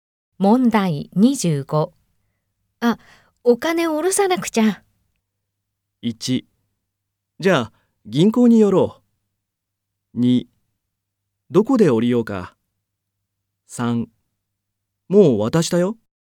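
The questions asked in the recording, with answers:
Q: あ、お金を下ろさなくちゃ。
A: 1: じゃあ、銀行に寄ろう。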